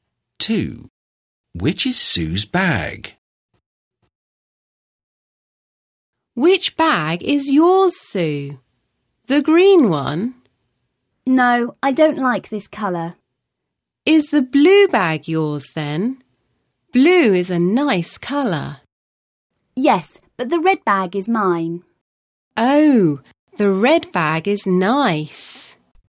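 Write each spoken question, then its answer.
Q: Which is Sue's bag?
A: The red bag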